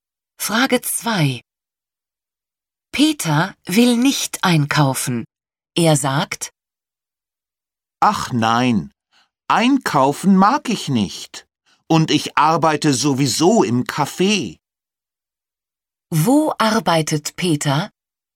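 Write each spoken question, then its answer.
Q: Wo arbeitet Peter?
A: Im Café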